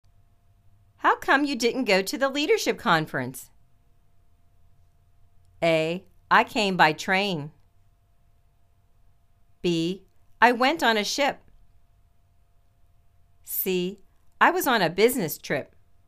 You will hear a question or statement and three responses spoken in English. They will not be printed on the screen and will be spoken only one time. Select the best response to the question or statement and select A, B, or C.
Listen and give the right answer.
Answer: I was on a business trip.